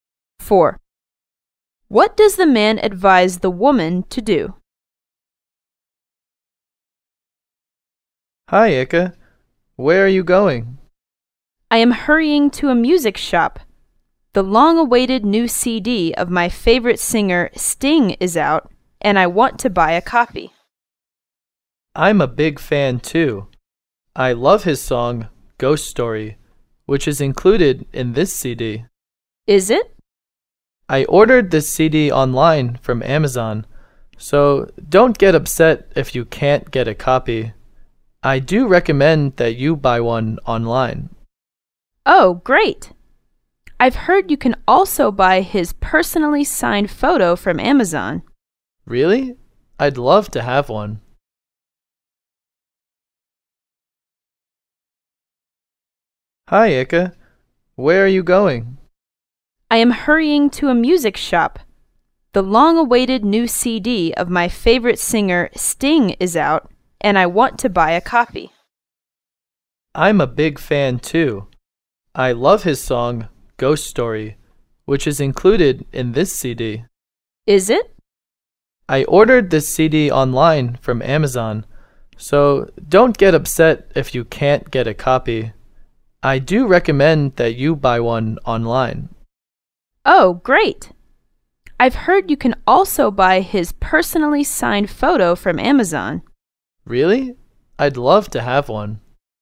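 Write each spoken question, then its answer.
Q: What does the man advise the woman to do?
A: Buy the CD online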